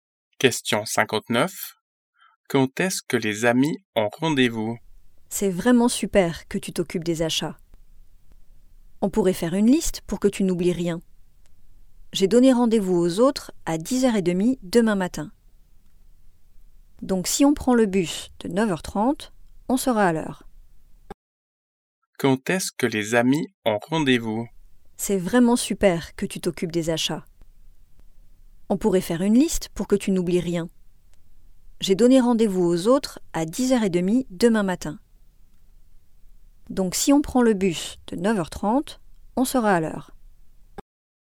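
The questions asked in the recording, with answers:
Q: Quand est-ce que les amis ont rendez-vous?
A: À 10h30 demain matin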